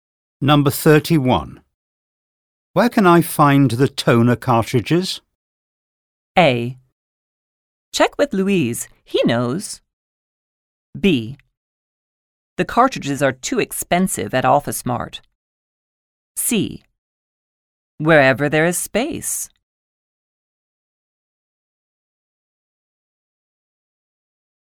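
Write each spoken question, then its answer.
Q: Where can I find the toner cartridges?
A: A: Check with Louise. He knows.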